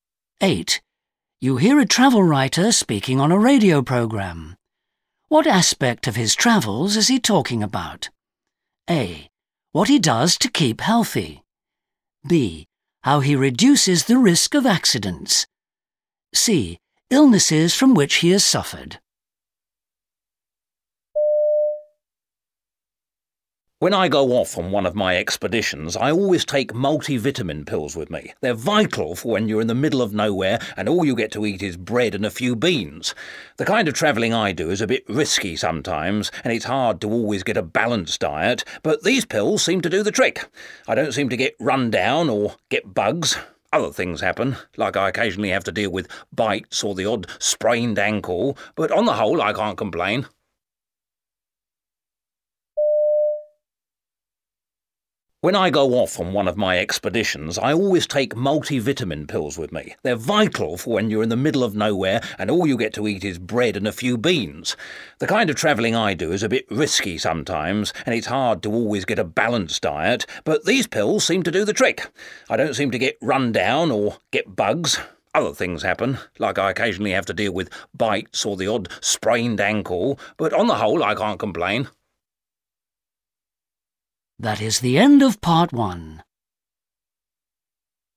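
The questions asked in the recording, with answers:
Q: What aspect of his travels is he talking about?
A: A: What he does to keep healthy.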